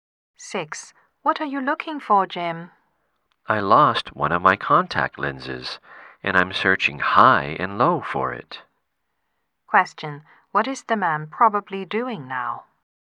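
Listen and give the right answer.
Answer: Looking for a lost contact lens.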